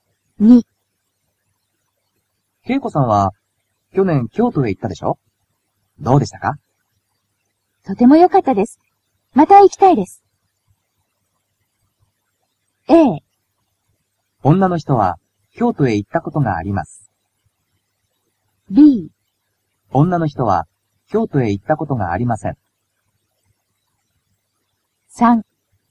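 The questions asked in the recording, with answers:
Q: 恵子さんは去年京都へ行ったでしょ?どうでしたか?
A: A: 女の人は京都へ行ったことがあります。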